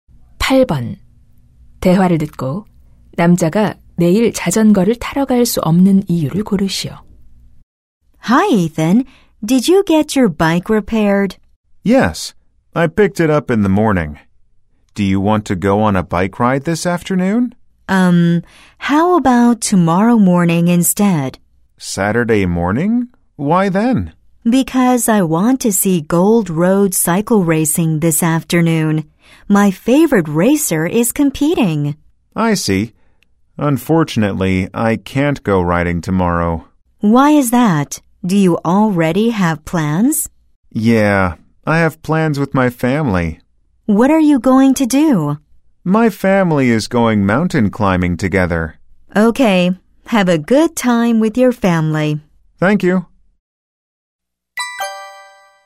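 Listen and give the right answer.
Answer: 가족과 등산을 가기 때문에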